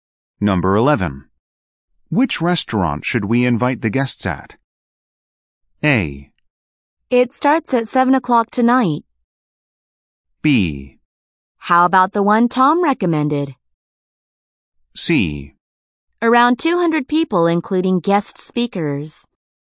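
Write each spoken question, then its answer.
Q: Which restaurant should we invite the guests at?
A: B: How about the one Tom recommended?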